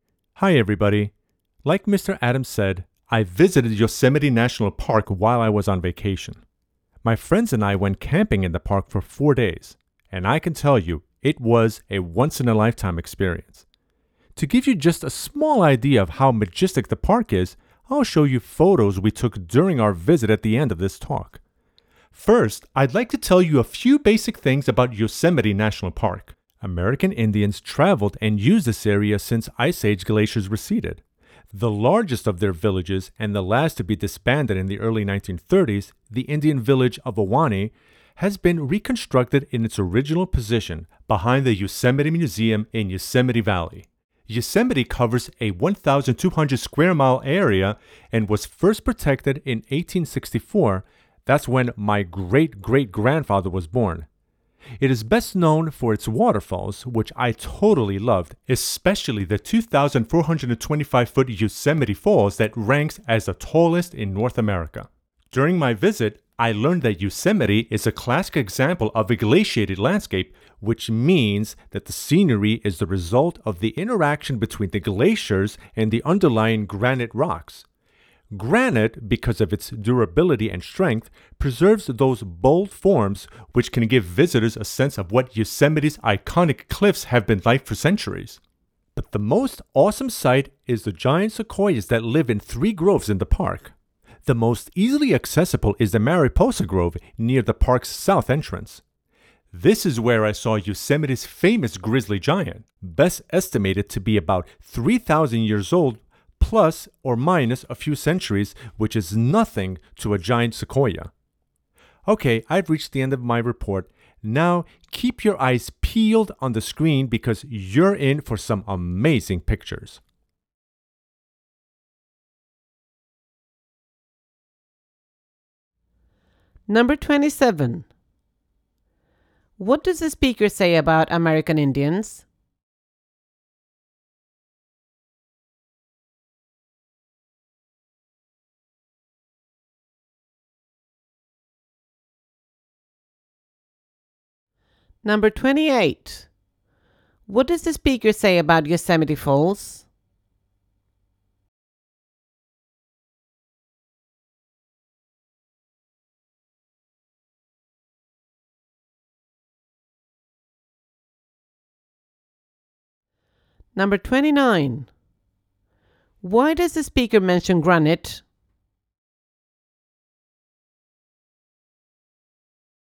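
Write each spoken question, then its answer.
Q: What does the speaker say about American Indians?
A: They used the area since the Ice Age glaciers receded; their largest village, Awani, has been reconstructed

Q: What does the speaker say about Yosemite Falls?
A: At 2,425 feet, it is the tallest waterfall in North America

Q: Why does the speaker mention granite?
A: Because it is durable and keeps the cliffs' bold forms, as part of a glaciated landscape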